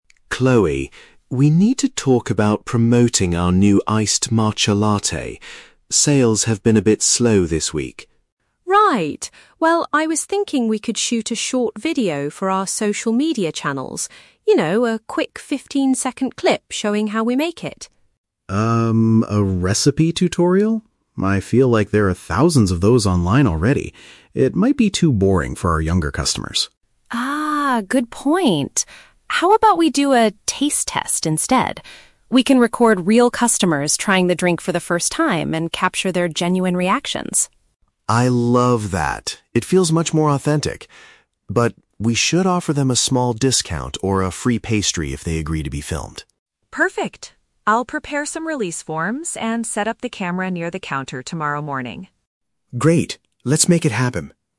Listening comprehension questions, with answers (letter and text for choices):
Listen to a conversation between a store manager and a marketing employee. For each question, choose the correct answer (A, B, or C).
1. Why does David reject Chloe's first idea for the video?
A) It requires buying very expensive camera equipment.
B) It is not unique enough to attract a younger audience.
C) It will take too much time away from serving customers.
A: B) It is not unique enough to attract a younger audience.

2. What is the final concept they choose for the social media clip?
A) Recording people's honest opinions of the beverage.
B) A step-by-step guide on how to brew the new coffee.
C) An interview with the cafe's most famous barista.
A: A) Recording people's honest opinions of the beverage.

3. What will the store offer to people who participate in the video?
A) The secret recipe for the iced matcha latte.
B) A cheaper price or a complimentary snack.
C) A full-time job in the marketing department.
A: B) A cheaper price or a complimentary snack.

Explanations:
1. David says there are "thousands of those online already" (not unique) and it might be "too boring for our younger customers". Option (A) is not mentioned. Option (C) is a plausible reason to reject an idea in a cafe, but it is not mentioned in the audio.
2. Chloe suggests recording customers trying the drink to capture their "genuine reactions," which means their honest opinions. Option (B) is a trap; Chloe initially suggested showing "how we make it" (a step-by-step guide/recipe tutorial), but David rejected this idea. Option (C) is never mentioned.
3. David suggests offering participants "a small discount" (a cheaper price) or "a free pastry" (a complimentary snack). Option (A) is a trap; the word "recipe" was mentioned earlier in the conversation, but they are not giving it away. Option (C) is plausible but completely incorrect based on the dialogue.

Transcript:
David: Chloe, we need to talk about promoting our new iced matcha latte. Sales have been a bit slow this week.
Chloe: Right. Well, I was thinking we could shoot a short video for our social media channels. You know, a quick 15-second clip showing how we make it.
David: Um, a recipe tutorial? I feel like there are thousands of those online already. It might be too boring for our younger customers.
Chloe: Ah, good point. How about we do a "taste test" instead? We can record real customers trying the drink for the first time and capture their genuine reactions.
David: I love that! It feels much more authentic. But... we should offer them a small discount or a free pastry if they agree to be filmed.
Chloe: Perfect. I'll prepare some release forms and set up the camera near the counter tomorrow morning.
David: Great. Let's make it happen.